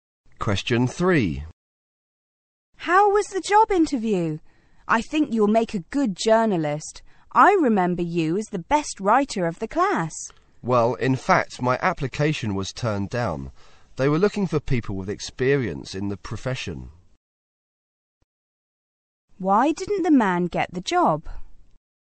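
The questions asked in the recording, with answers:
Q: Why didn't the man get the job?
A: He had no professional experience.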